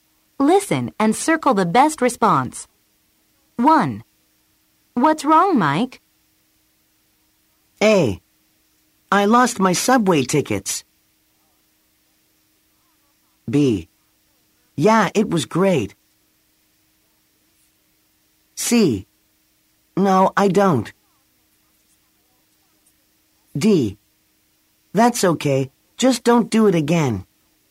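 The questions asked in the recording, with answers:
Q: What's wrong, Mike?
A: A: I lost my subway tickets.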